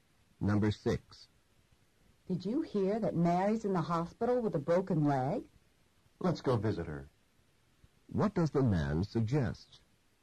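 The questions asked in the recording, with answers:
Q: What does the man suggest?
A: Visiting Mary in the hospital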